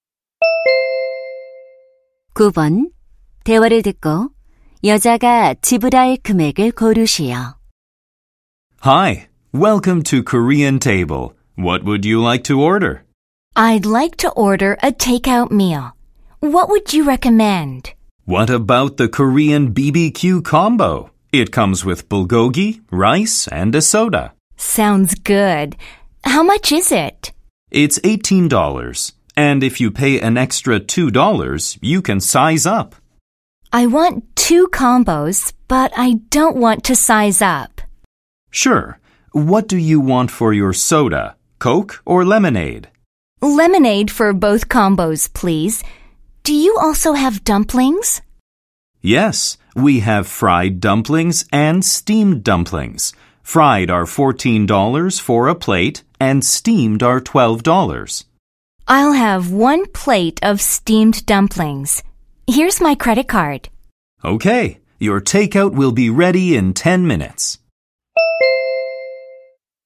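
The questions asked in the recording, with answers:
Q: 대화를 듣고 여자가 지불할 금액을 고르시오.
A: $48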